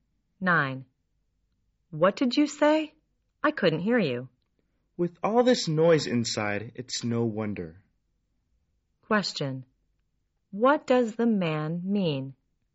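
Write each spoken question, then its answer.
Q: What does the man mean?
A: It's too noisy inside to hear.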